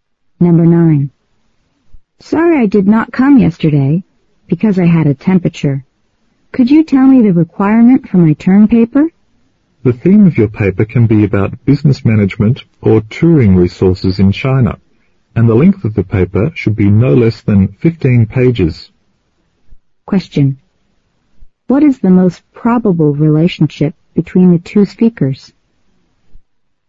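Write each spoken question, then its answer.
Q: What is the most probable relationship between the two speakers?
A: Student and teacher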